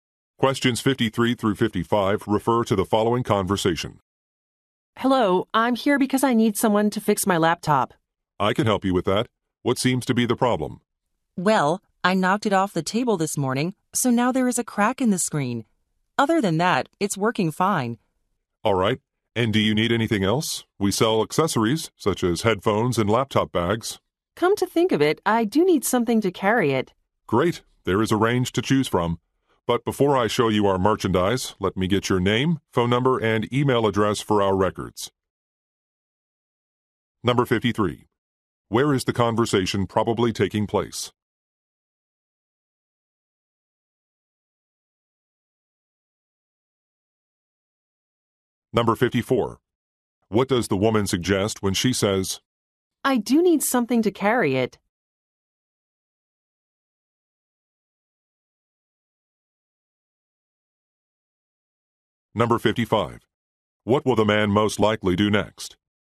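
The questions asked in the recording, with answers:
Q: Where is the conversation probably taking place?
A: At a computer repair shop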